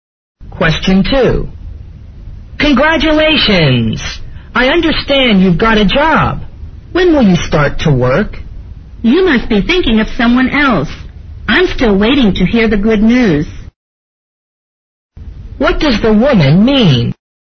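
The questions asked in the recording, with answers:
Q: What does the woman mean?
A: She hasn't got a job yet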